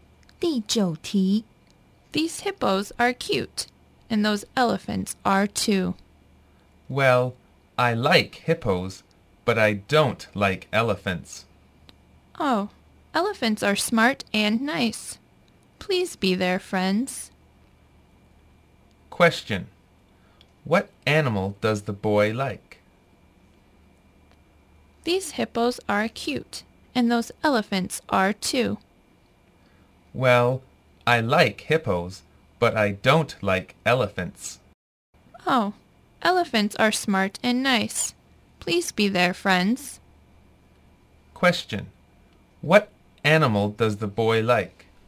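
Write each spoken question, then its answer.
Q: Question.What animal does the boy like?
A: Hippos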